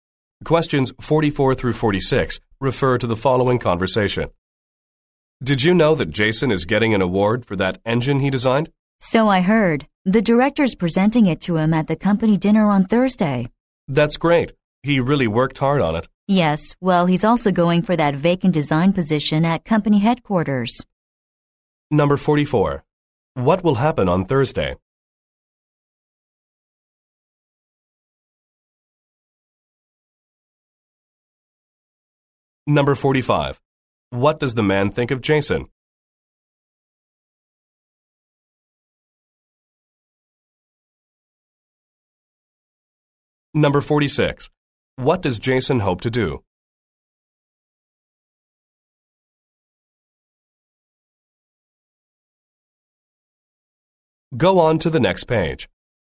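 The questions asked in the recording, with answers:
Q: What will happen on Thursday?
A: Jason will get an award at the company dinner

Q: What does Jason hope to do?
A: Get the vacant design position at headquarters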